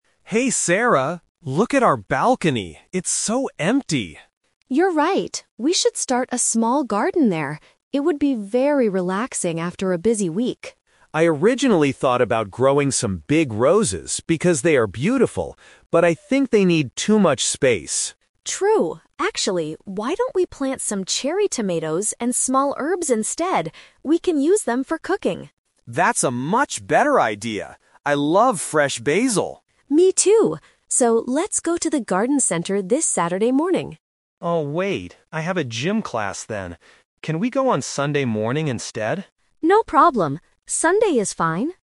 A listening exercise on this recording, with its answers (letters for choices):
Listen to two roommates talking about their balcony. Choose the correct answer (A, B, or C).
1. Why did Jack decide NOT to grow roses?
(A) Because they are not beautiful.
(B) Because they are too expensive.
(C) Because the balcony is too small.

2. What are they going to plant in their garden?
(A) Roses and herbs.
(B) Tomatoes and herbs.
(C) Just cherry tomatoes.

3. When are they going to the garden center?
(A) Saturday morning.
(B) Saturday afternoon.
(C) Sunday morning.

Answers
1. C
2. B
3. C

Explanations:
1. Jack mentions he thought about roses but then says, "...but I think they need too much space." At A2 level, "too much space" is a paraphrase for the balcony being "too small."
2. Sarah suggests "cherry tomatoes and small herbs" and Jack agrees, specifically mentioning "basil" (which is a type of herb).
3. They first suggest Saturday morning, but Jack says he is busy with a "gym class." He then asks, "Can we go on Sunday morning instead?" and Sarah agrees.

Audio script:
Jack: Hey Sarah, look at our balcony. It's so empty!
Sarah: You're right. We should start a small garden there. It would be very relaxing after a busy week.
Jack: I originally thought about growing some big roses because they are beautiful, but I think they need too much space.
Sarah: True. Actually, why don't we plant some cherry tomatoes and small herbs instead? We can use them for cooking!
Jack: That's a much better idea! I love fresh basil.
Sarah: Me too. So, let's go to the garden center this Saturday morning.

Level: A2